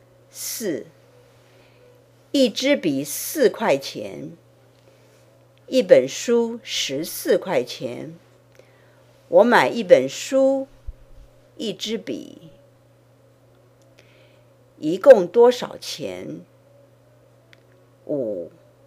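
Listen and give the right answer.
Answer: 18块钱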